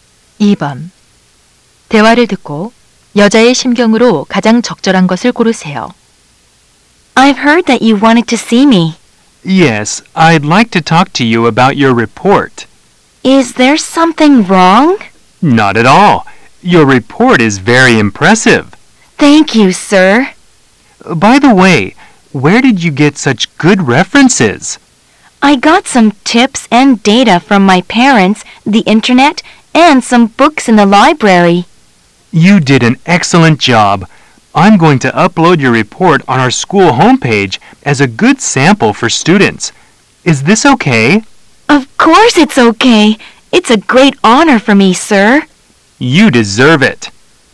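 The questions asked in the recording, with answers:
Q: 대화를 듣고 여자의 심경으로 가장 적절한 것을 고르세요.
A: 자랑스럽고 기쁨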